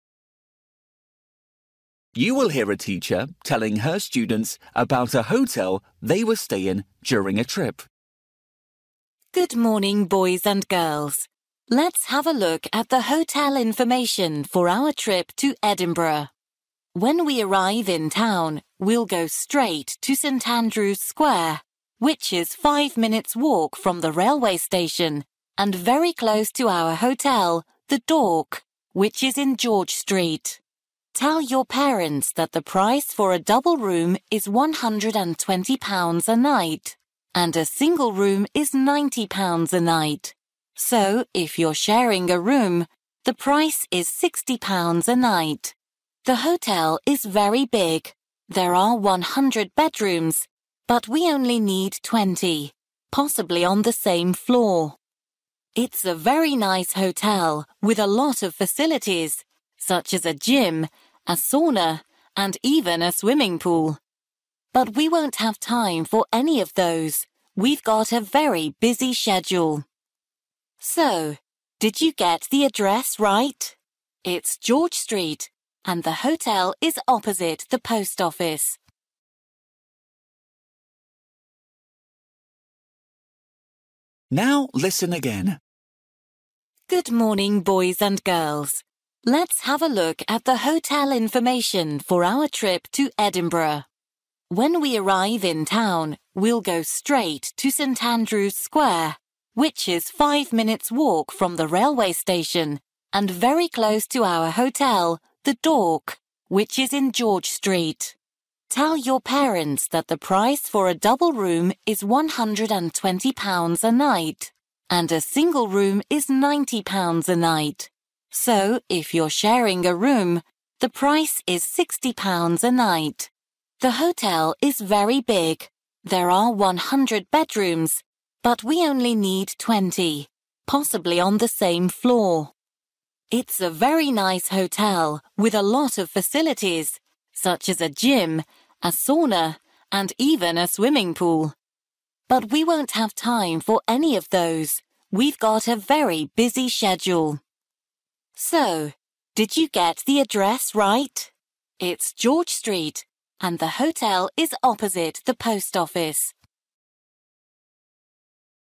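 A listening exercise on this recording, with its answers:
For each question, write the correct answer in the gap. Write one word or a number or a date or a time.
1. Location: (1) in Street.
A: George

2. Price for single room: (2) £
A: 90

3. Number of bedrooms: (3)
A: 100

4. Facilities: (4) gym, sauna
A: swimming pool

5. How to find it: (5) it's the post office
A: opposite

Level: Luyện nghe trình độ A2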